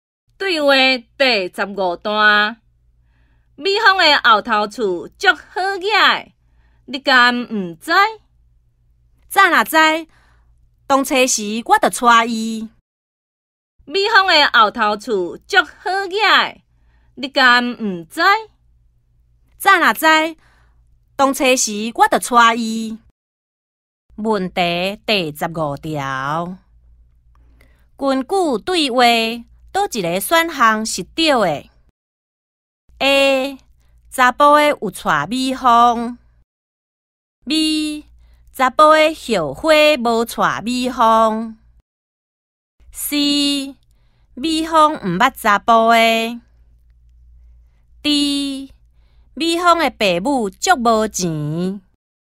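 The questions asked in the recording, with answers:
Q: 根据对话。哪一个选项是对的 ?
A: B: 查甫的后悔无娶美芳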